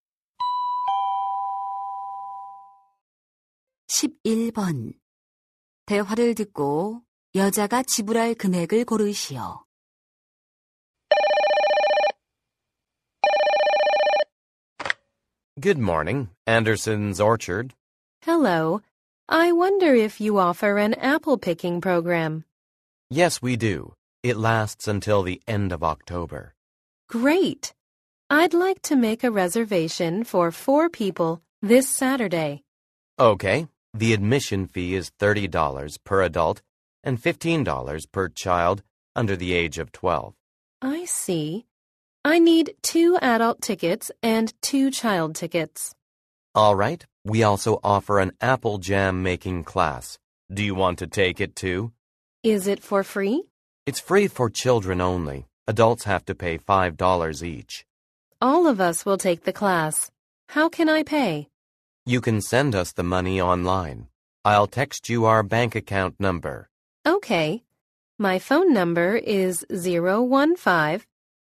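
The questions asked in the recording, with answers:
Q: 대화를 듣고 여자가 지불할 금액을 고르시오.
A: $100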